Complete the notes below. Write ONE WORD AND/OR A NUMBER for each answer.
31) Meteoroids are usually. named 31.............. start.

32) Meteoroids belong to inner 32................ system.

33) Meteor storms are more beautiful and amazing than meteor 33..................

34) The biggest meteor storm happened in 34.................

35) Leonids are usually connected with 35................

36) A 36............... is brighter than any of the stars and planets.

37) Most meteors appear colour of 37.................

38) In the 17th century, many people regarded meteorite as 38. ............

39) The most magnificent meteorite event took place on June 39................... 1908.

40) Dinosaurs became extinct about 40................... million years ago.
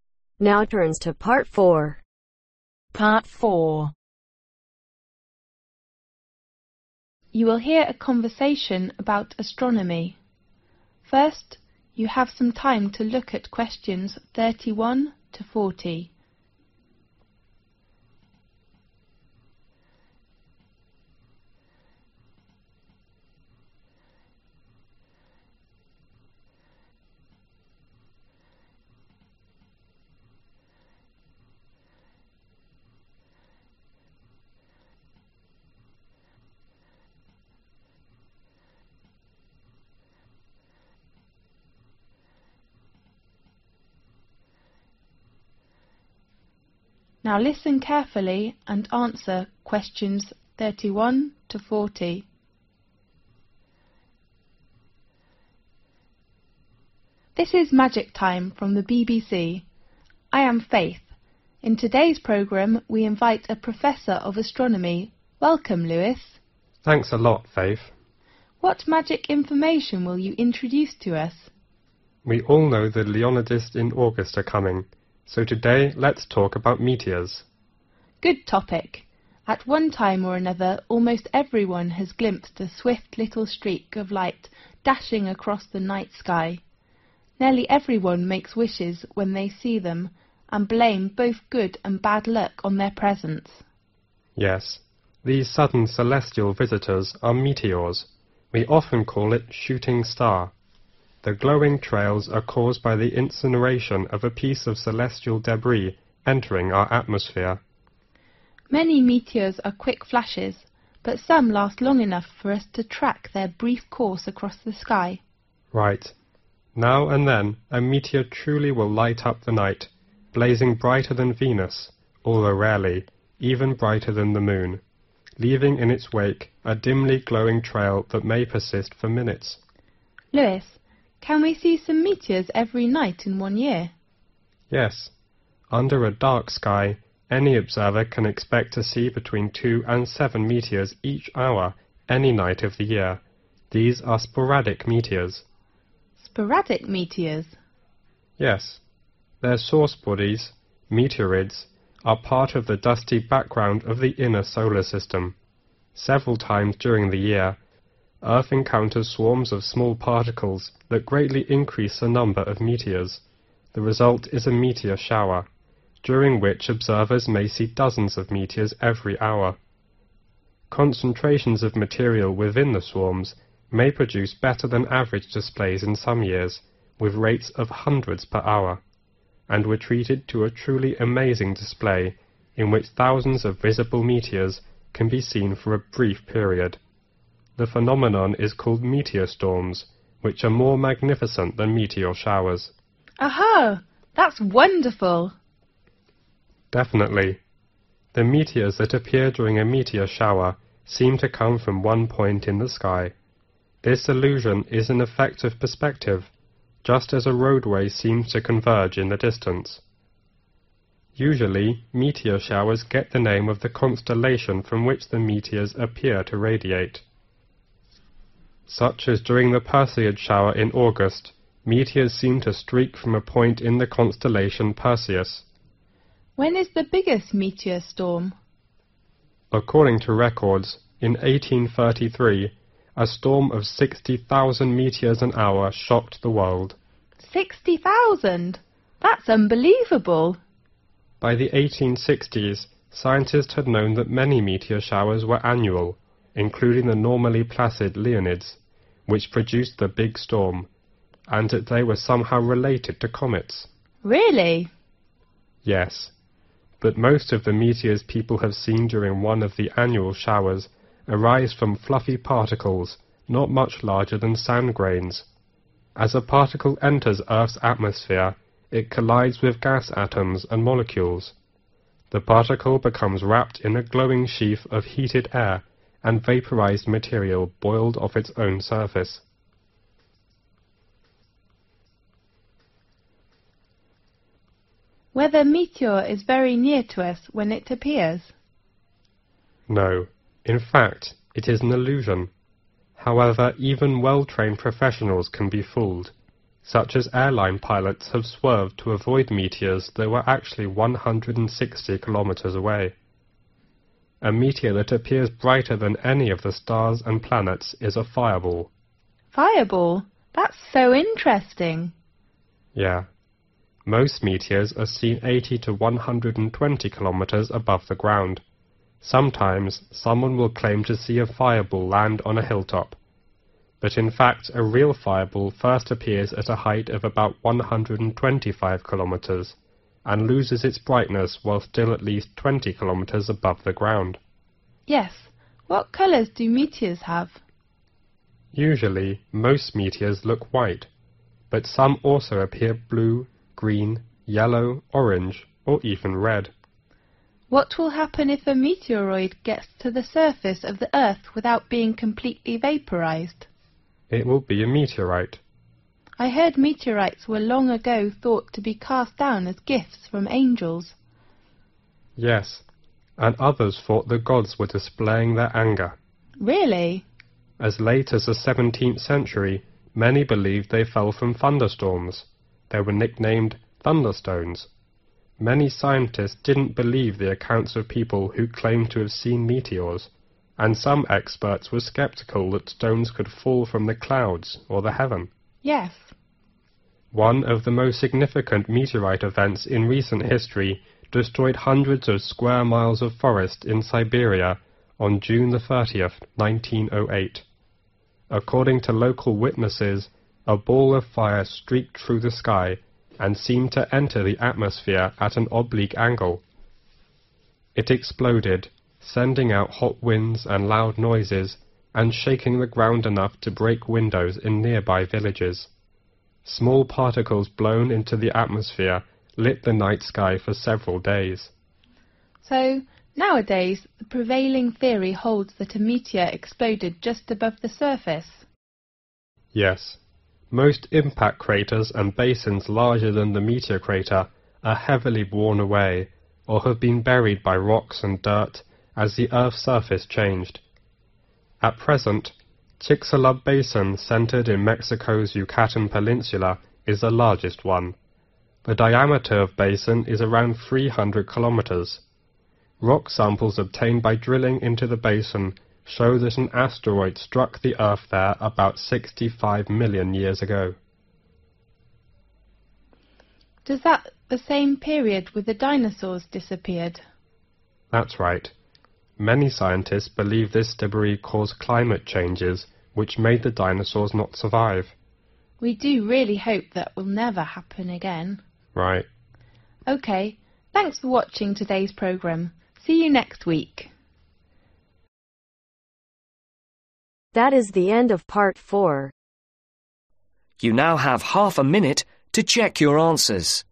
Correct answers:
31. Shooting
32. Solar
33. Showers
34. 1833
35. Comets
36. Fireball
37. White
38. Thunderstones
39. 30
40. 65